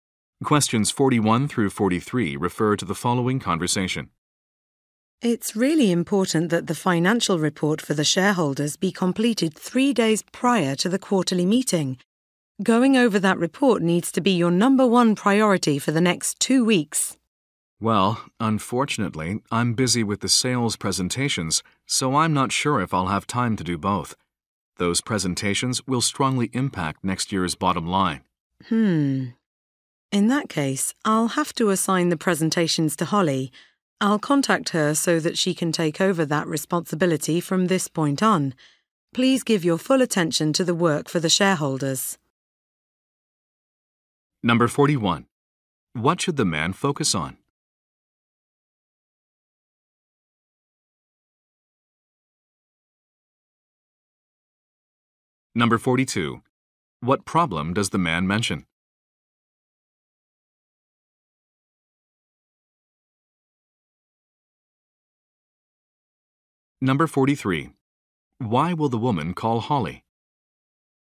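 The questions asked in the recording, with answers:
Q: What should the man focus on?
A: The financial report for the shareholders

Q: What problem does the man mention?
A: He is busy with the sales presentations

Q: Why will the woman call Holly?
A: To assign her the sales presentations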